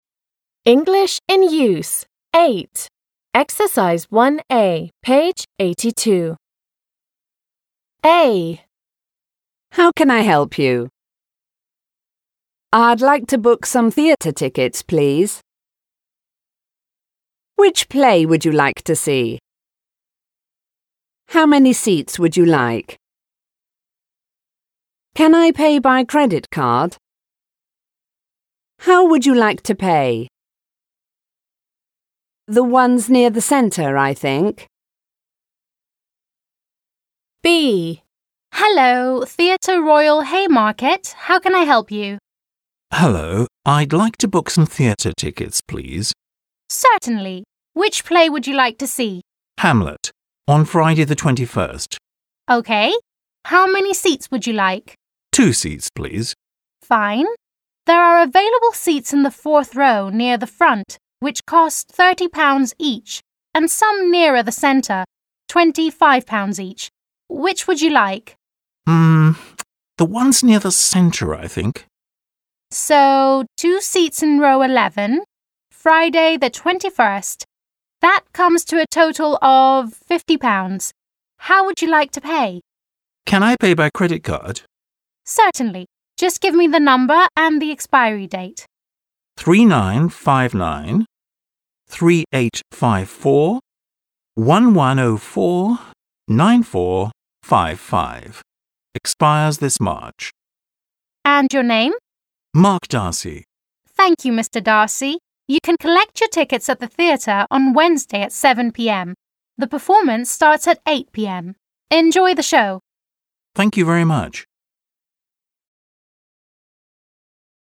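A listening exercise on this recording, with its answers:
a) Listen and read the sentences below. Which belong to the receptionist (R)/to the customer (C)? What are they talking about? Listen and check.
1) What are they talking about?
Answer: The receptionist and a customer are talking about booking tickets for the theatre.

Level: 6 класс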